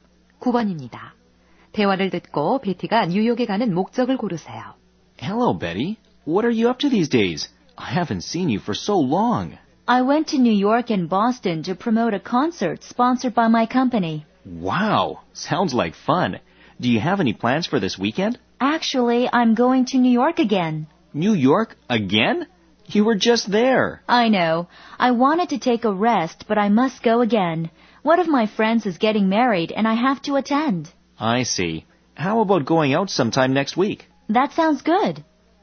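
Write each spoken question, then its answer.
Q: 대화를 듣고 베티가 뉴욕에 가는 목적을 고르세요.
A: 친구 결혼식 참석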